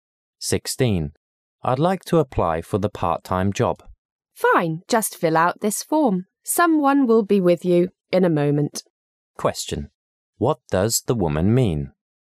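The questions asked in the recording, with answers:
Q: What does the woman mean?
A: The man should fill out the form, and someone will help him soon.

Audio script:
[解析] M: I'd like to apply for the part-time job. W: Fine. Just fill out this form. Someone will be with you in a moment. Q: What does the woman mean?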